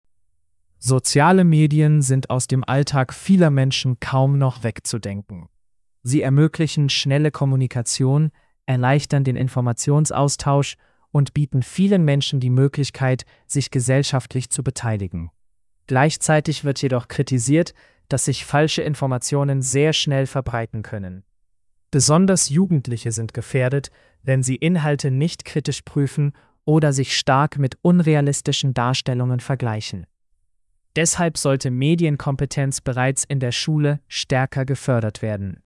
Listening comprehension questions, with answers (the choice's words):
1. Welche positive Seite sozialer Medien wird genannt?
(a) Sie ersetzen persönliche Gespräche vollständig.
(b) Sie erleichtern Kommunikation und Informationsaustausch.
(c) Sie verhindern falsche Informationen.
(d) Sie machen alle Jugendlichen selbstbewusster.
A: Sie erleichtern Kommunikation und Informationsaustausch.

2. Welche Kritik wird genannt?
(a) Falsche Informationen können sich schnell verbreiten.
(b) Soziale Medien werden kaum genutzt.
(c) Jugendliche interessieren sich nicht für soziale Medien.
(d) Schulen nutzen zu viele Bücher.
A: Falsche Informationen können sich schnell verbreiten.

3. Was wird als Lösung vorgeschlagen?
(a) Medienkompetenz stärker fördern.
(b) Alle Smartphones verbieten.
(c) Nachrichten nur noch im Fernsehen zeigen.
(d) Jugendliche nicht mehr zur Schule schicken.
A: Medienkompetenz stärker fördern.

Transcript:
Soziale Medien sind aus dem Alltag vieler Menschen kaum noch wegzudenken. Sie ermöglichen schnelle Kommunikation, erleichtern den Informationsaustausch und bieten vielen Menschen die Möglichkeit, sich gesellschaftlich zu beteiligen. Gleichzeitig wird jedoch kritisiert, dass sich falsche Informationen sehr schnell verbreiten können. Besonders Jugendliche sind gefährdet, wenn sie Inhalte nicht kritisch prüfen oder sich stark mit unrealistischen Darstellungen vergleichen. Deshalb sollte Medienkompetenz bereits in der Schule stärker gefördert werden.

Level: C1-Niveau